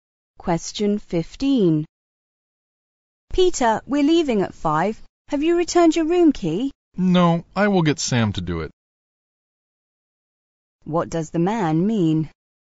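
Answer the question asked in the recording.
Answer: Sam will return the room key for him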